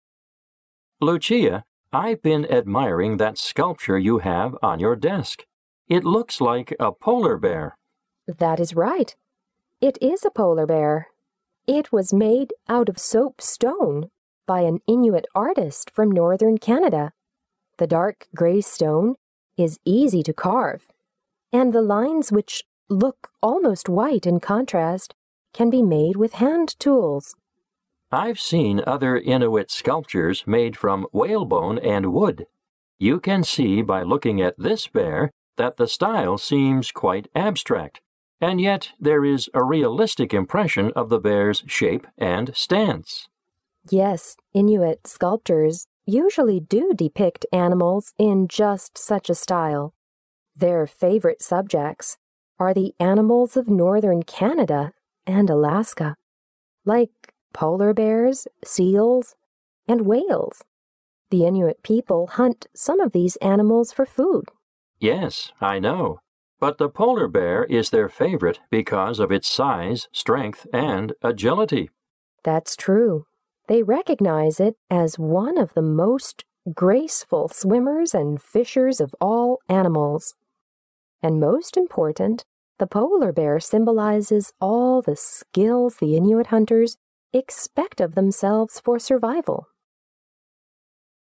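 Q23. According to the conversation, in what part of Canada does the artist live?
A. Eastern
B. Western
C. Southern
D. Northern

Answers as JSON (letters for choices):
{"23": "D"}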